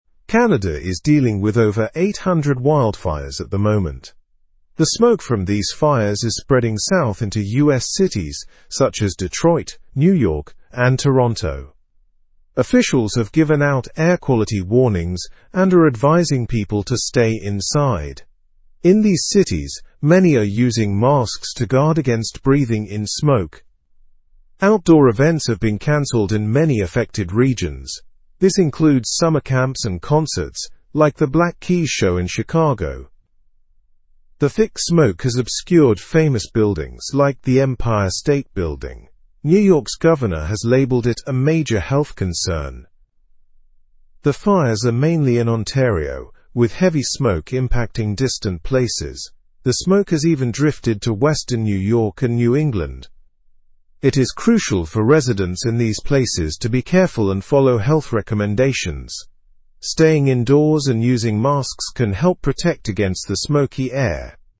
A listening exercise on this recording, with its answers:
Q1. What is happening in Canada currently?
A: Canada is experiencing over 800 wildfires.

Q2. Which US cities are being affected by the smoke from these wildfires?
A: Cities such as Detroit, New York, and Toronto are being affected.

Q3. What have the officials advised people to do?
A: Officials have advised people to stay indoors and wear masks.

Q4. Why were outdoor activities like concerts canceled?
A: Outdoor activities were canceled to protect people from the smoke.

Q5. Which building has been hard to see due to the smoke?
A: The Empire State Building has been hard to see.

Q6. Who called the fire situation a serious health concern?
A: The governor of New York called it a serious health situation.

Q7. Where are the fires mainly located?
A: The fires are mainly located in the Ontario region.

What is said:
Canada is dealing with over 800 wildfires at the moment. The smoke from these fires is spreading south into US cities such as Detroit, New York, and Toronto. Officials have given out air quality warnings and are advising people to stay inside. In these cities, many are using masks to guard against breathing in smoke.
Outdoor events have been canceled in many affected regions. This includes summer camps and concerts, like the Black Keys show in Chicago. The thick smoke has obscured famous buildings like the Empire State Building. New York's governor has labeled it a major health concern.
The fires are mainly in Ontario, with heavy smoke impacting distant places. The smoke has even drifted to western New York and New England. It is crucial for residents in these places to be careful and follow health recommendations.

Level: Level 2